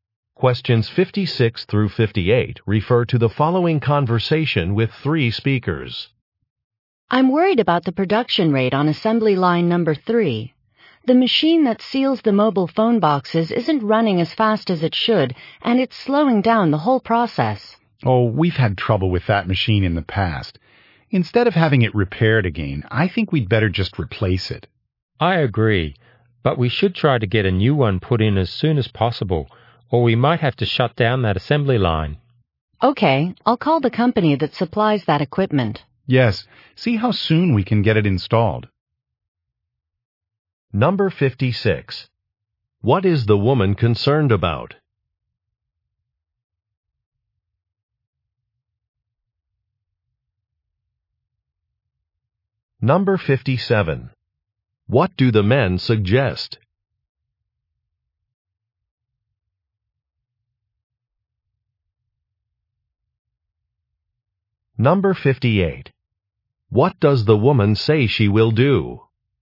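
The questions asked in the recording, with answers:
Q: What is the woman concerned about?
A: A slow production rate on an assembly line

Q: What do the men suggest?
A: Replacing the machine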